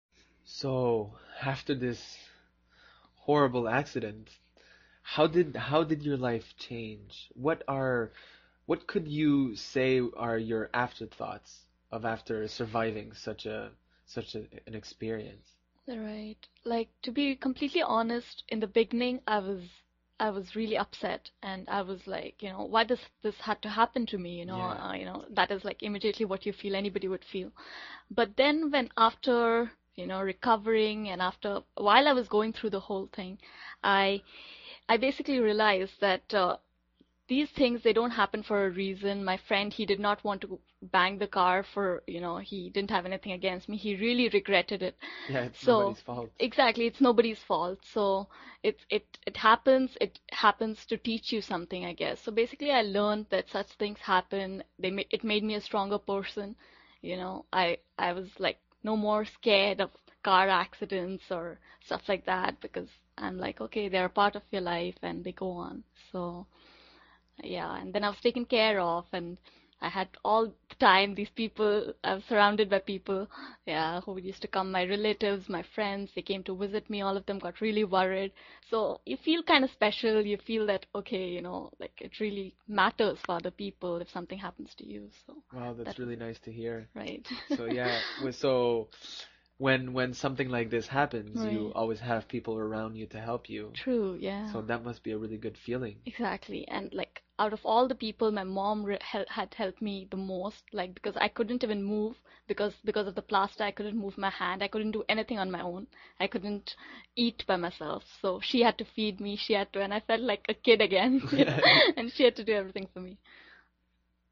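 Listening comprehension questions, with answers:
用 1-2 句话用自己的话回答下面的问题。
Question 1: What did Shibika say her initial emotional reaction was after the accident, and what exact question did she ask herself?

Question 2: According to Shibika, what did her friend who was driving feel about the accident, and what did Fred say about it?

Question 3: What specific physical limitation did Shibika mention because of the plaster, and what did her mother have to do for her as a result?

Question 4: What feeling did Shibika say she got from having relatives and friends visit her while she was recovering?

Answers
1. She was really upset and asked, "Why does this have to happen to me?"
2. Her friend really regretted it; Fred said it wasn't his fault.
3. She couldn't move her hand or eat by herself, so her mother had to feed her and do everything for her.
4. She felt kind of special, as if it really mattered to other people.

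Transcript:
So, after this horrible accident, how did life your change? What are... What could you say are your after thoughts of after surviving such an experience?
Right. Like, to be completely honest , in the beginning I was really upset and I was like, you know, "Why does this have to happen to me?" you know. That is like immediately what you feel, what anybody would feel . But then when after, you know, recovering and after... while I was going through the whole thing, I basically realized that these things, they don't happen for a reason. My friend, he did not want to bang the car, you know, he didn't have anything against me. He really regretted it.
Yeah, it wasn't his fault.
Exactly. It's nobodies fault , so it happens. It happens to teach you something, I guess, so basically I learned that such things happen. It made me a stronger person, you know, I was like, no more scared of car accidents or stuff like that because I'm like, OK, they're a part of your life and they go on, so. 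Yeah, and then I was taken care of. I had all the time, these people, surrounded by people, yeah, who used to come: my relatives, my friends, they came to visit me. All of them got really worried so you feel kind of special. You feel that, OK, you know, like it really matters for other people when something happens to you.
Wow, that's really nice to hear. So yeah, so when something like this happens, you always have people around you to help you.
True, yeah.
So that must be a really good feeling.
Exactly, and like, out of all the people, my mom had helped me the most, like because I couldn't even move because of the plaster.
ShibikaExactly, and like, out of all the people, my mom had helped me the most, like because I couldn't even move because of the plaster. I couldn't move my hand. I couldn't do anything on my own. I couldn't eat by myself, so she had to feed me. She had to and I felt like a kid again , and she had to do everything. 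for me.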